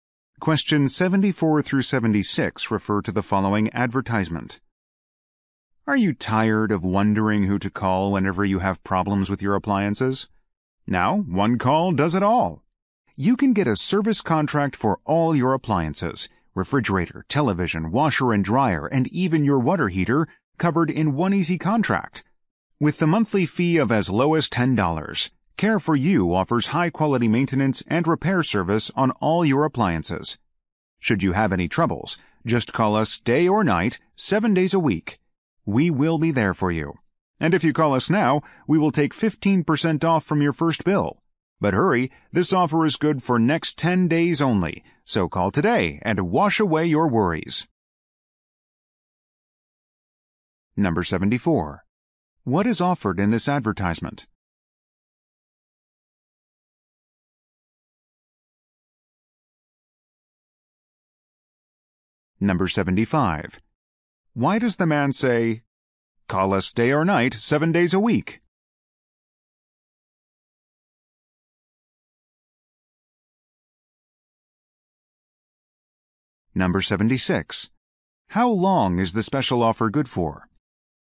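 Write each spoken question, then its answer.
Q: What is offered in this advertisement?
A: A service contract for appliances

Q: How long is the special offer good for?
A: 10 days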